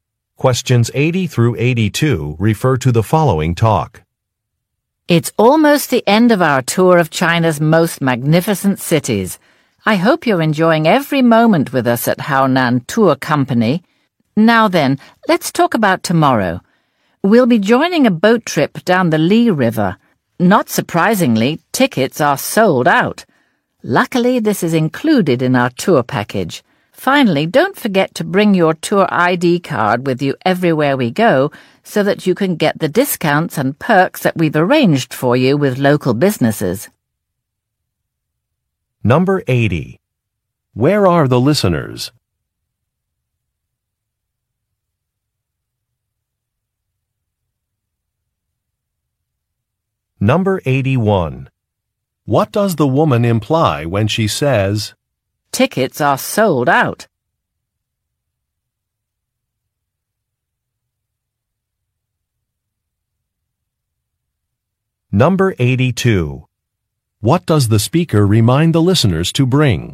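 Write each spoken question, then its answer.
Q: Where are the listeners?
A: On a tour of China's cities with Haonan Tour Company

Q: What does the speaker remind the listeners to bring?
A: Their tour ID card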